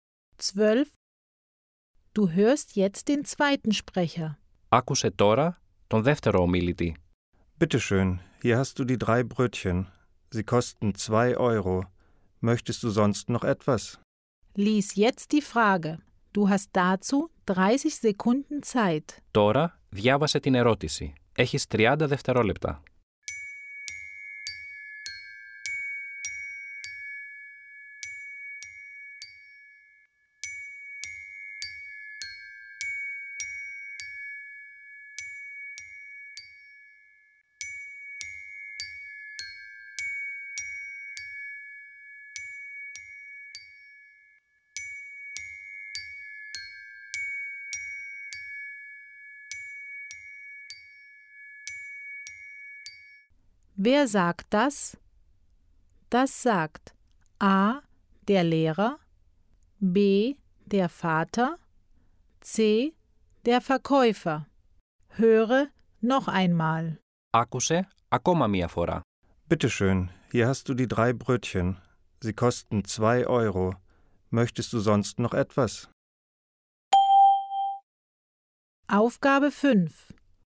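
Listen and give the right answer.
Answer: C: der Verkäufer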